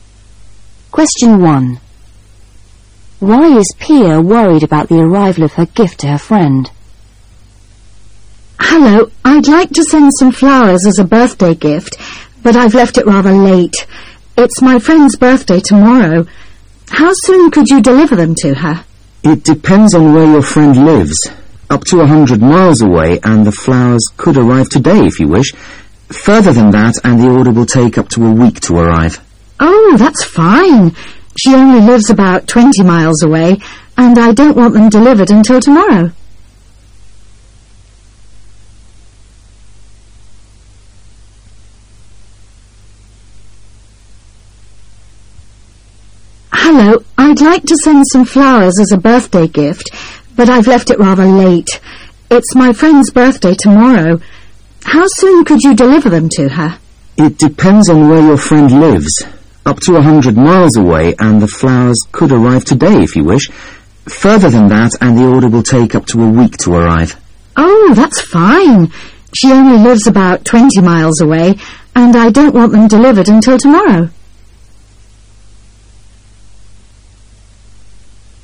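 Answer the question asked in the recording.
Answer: She left it late; her friend's birthday is tomorrow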